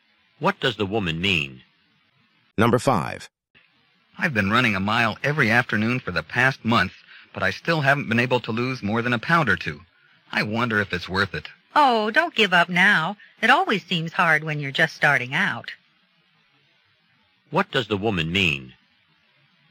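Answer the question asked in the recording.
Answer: He should keep running; it's always hard at the beginning.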